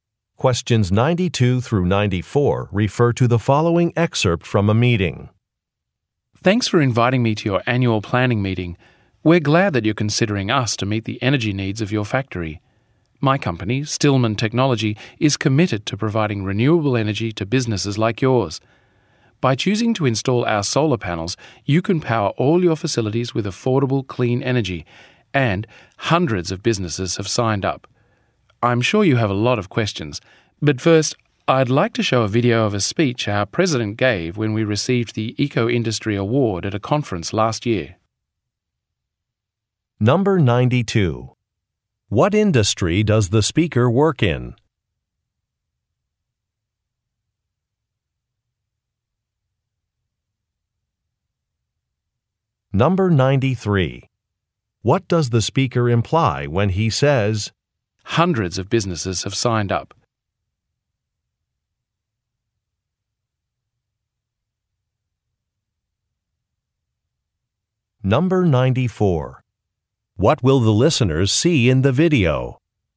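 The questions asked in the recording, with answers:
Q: What industry does the speaker work in?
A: Renewable (solar) energy

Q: What will the listeners see in the video?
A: A speech by the company president at an award conference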